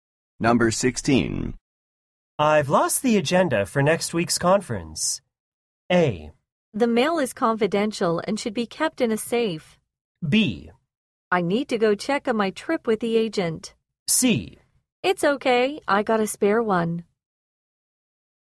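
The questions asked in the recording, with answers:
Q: I've lost the agenda for next week's conference.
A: C: It's okay, I got a spare one.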